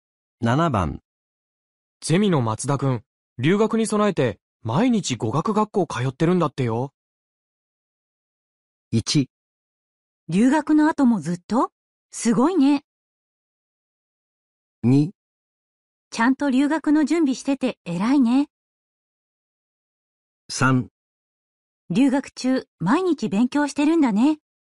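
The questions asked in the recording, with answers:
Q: ゼミの松田くん、留学に備えて毎日語学学校通ってるんだってよ。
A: 2: ちゃんと留学の準備してて偉いね。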